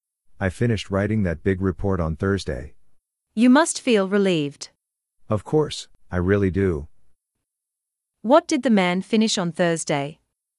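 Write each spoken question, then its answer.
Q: What did the man finish on Thursday?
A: A big report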